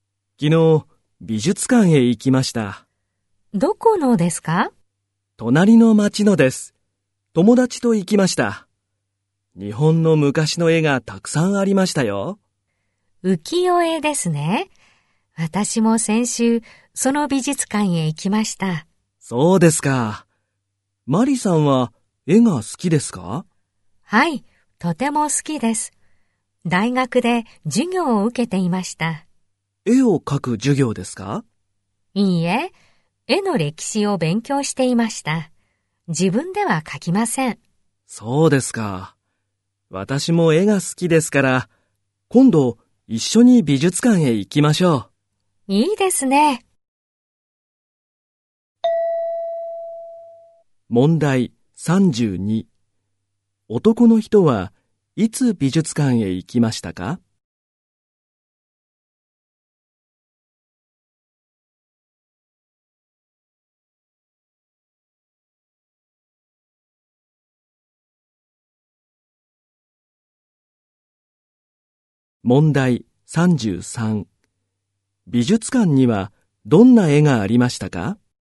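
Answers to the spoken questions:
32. 昨日
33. 日本の昔の絵(浮世絵)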